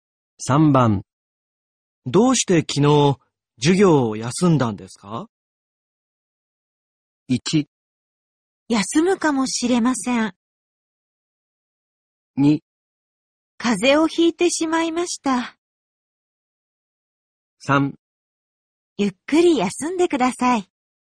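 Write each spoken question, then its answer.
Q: どうして昨日授業を休んだんですか?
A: 2: 風邪をひいてしまいました。

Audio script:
1
休むかもしれません。
2
風邪をひいてしまいました。
3
ゆっくり休んでください。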